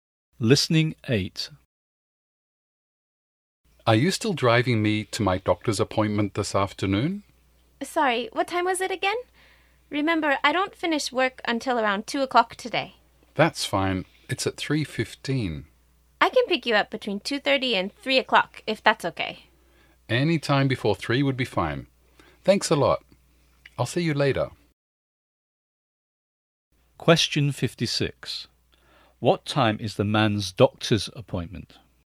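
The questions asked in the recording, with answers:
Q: What time is the man's doctor's appointment?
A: 3:15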